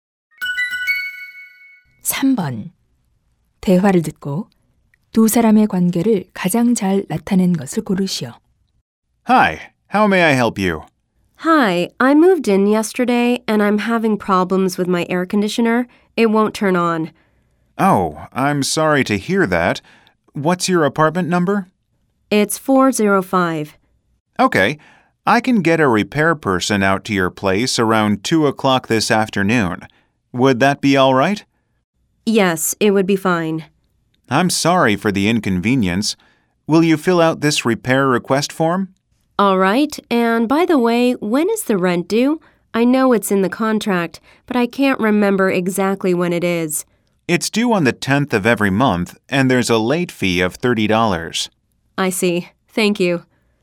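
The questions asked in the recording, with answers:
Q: 대화를 듣고 두 사람의 관계를 가장 잘 나타낸 것을 고르시오.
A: 세입자 - 아파트 관리인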